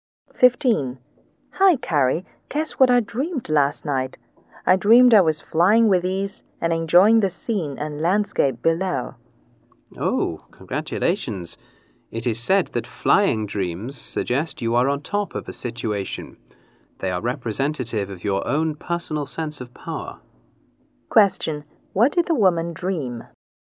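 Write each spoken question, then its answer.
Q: What did the woman dream?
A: She was flying with ease and enjoying the scenery below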